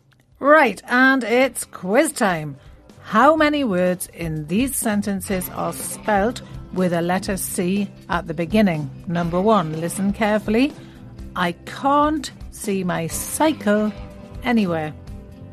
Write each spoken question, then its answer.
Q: How many words in these sentences are spelt with a letter C at the beginning?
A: there were two words with C at the beginning, can't and cycle.